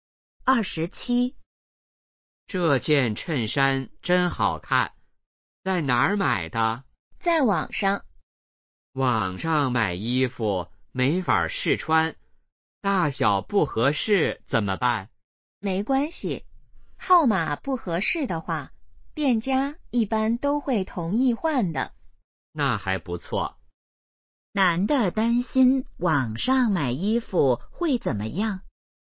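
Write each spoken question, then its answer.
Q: 男的担心网上买衣服会怎么样?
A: 大小不合适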